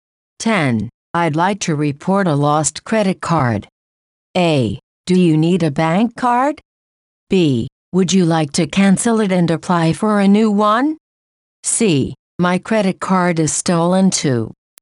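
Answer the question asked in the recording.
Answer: B: Would you like to cancel it and apply for a new one?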